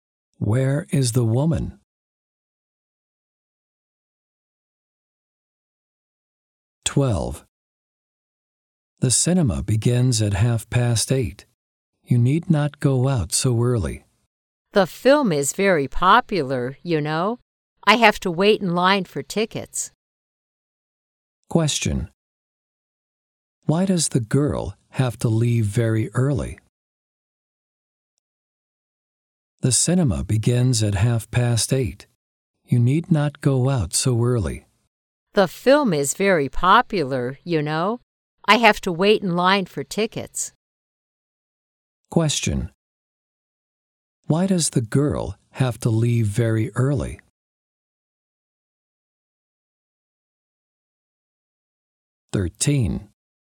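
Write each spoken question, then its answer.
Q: Why does the girl have to leave very early?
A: She has to wait in line for tickets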